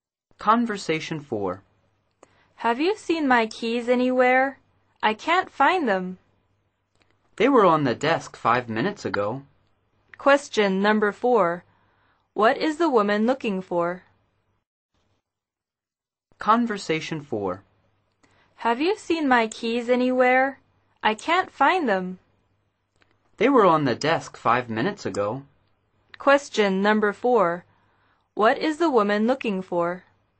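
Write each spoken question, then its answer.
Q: What is the woman looking for?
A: Her keys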